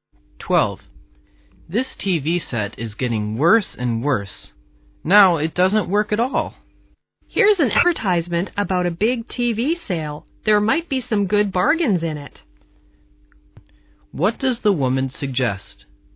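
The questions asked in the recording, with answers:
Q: What does the woman suggest?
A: Buy a new TV in the sale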